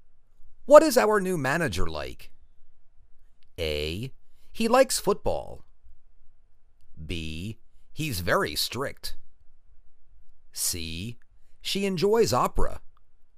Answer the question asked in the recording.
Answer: He's very strict.